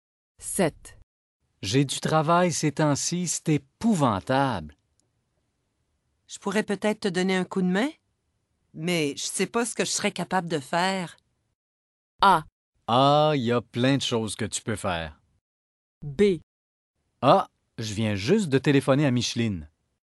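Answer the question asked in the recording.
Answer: A: Ah, il y a plein de choses que tu peux faire.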